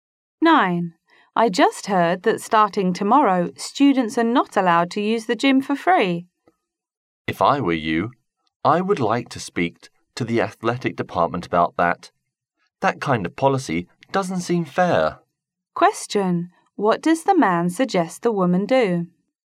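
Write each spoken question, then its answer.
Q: What does the man suggest the woman do?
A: Speak to the athletic department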